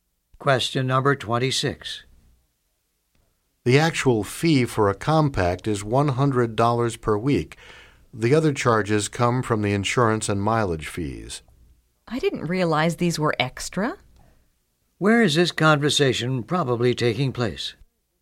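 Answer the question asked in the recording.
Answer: At a car rental agency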